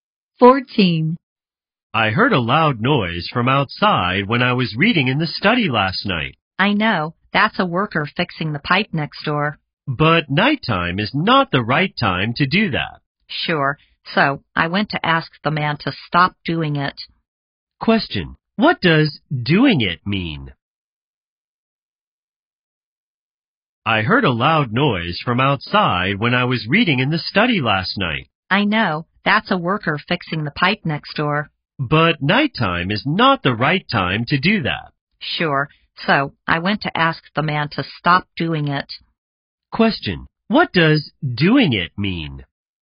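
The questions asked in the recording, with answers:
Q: Question. What does doing it mean?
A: Fixing the pipe next door at night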